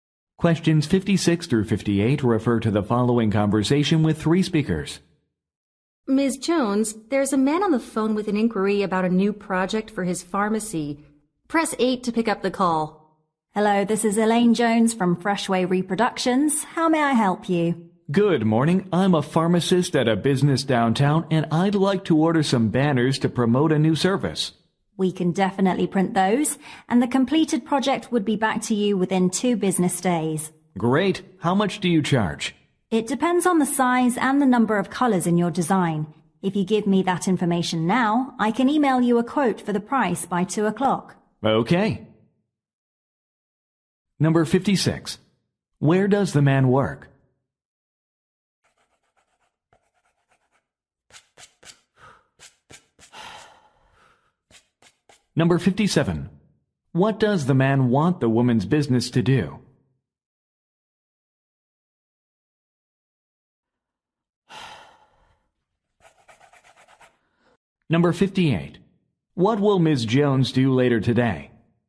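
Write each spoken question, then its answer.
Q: Where does the man work?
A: At a pharmacy

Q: What does the man want the woman's business to do?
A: Print banners

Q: What will Ms. Jones do later today?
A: Email a price quote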